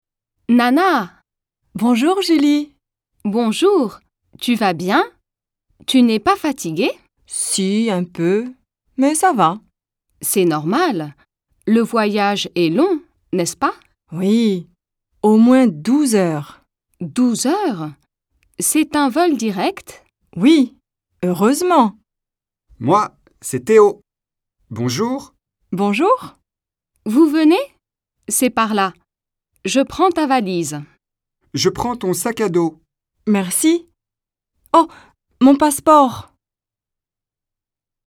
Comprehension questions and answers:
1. How long was Nana's journey to France?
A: Nana's journey to France took at least 12 hours.

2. What does Julie offer to carry for Nana?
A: Julie offers to carry Nana's suitcase.

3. Julie asks Nana, "________ tu vas bien?"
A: Bonjour

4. Nana replies, "Oui, au moins ________ heures."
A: 12

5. Théo says, "Je prends ton ________."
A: sac à dos

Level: intermediate